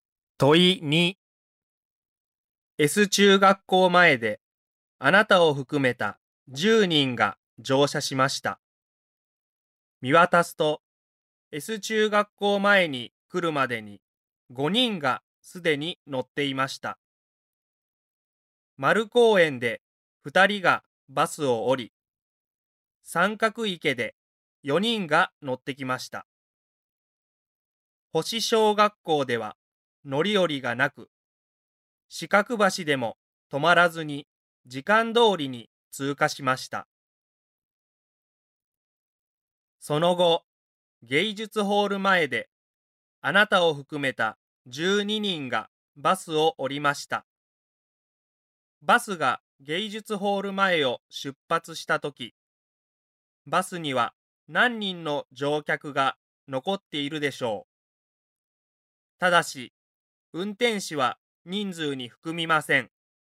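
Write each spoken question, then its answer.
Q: バスが芸術ホール前を出発したとき、バスには何人の乗客が残っているでしょう。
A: 5人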